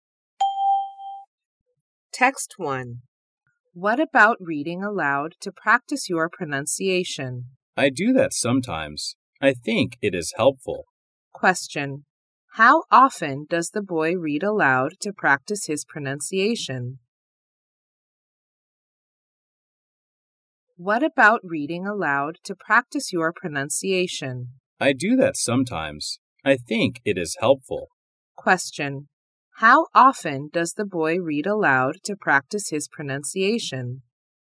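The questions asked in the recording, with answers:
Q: How often does the boy read aloud to practice his pronunciation?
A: Sometimes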